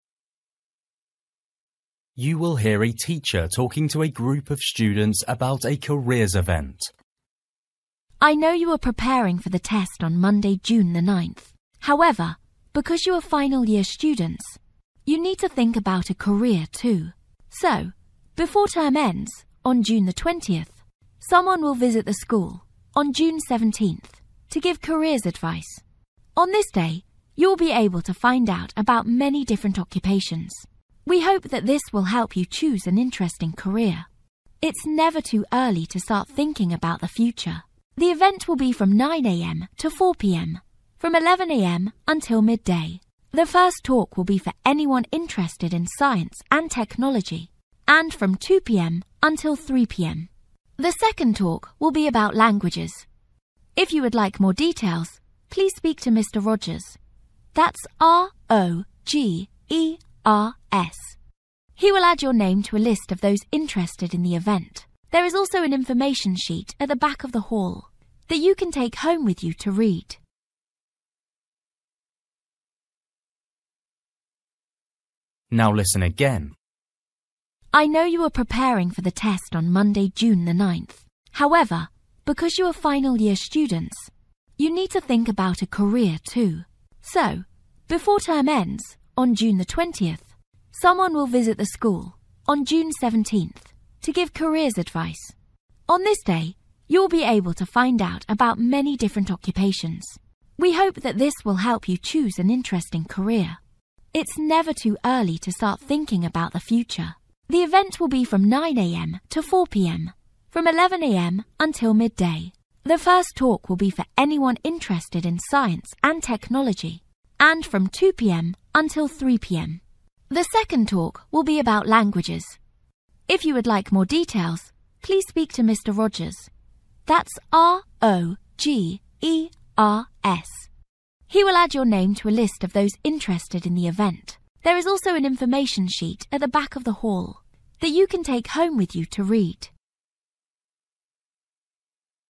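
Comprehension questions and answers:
For each question, write the correct answer in the gap. Write one word or a number or a date or a time.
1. Date: (1)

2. Information about: (2)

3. Event until: (3) pm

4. First talk on: (4) science &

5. Ask questions: (5) Mr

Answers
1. June 17th
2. occupations
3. 4
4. technology
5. Rogers

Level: Luyện nghe trình độ A2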